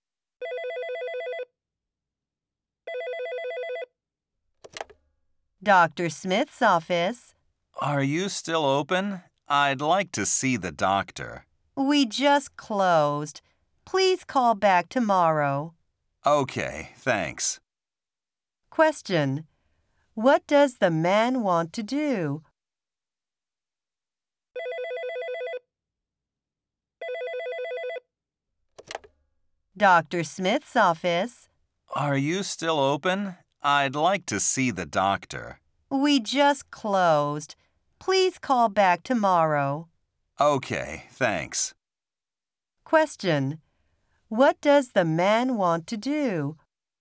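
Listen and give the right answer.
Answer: See the doctor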